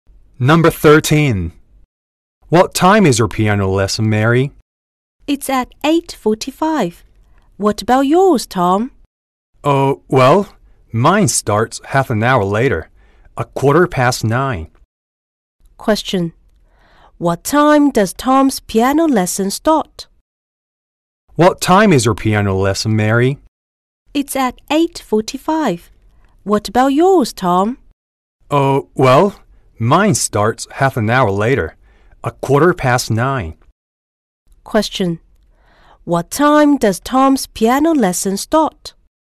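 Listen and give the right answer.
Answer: At 9:15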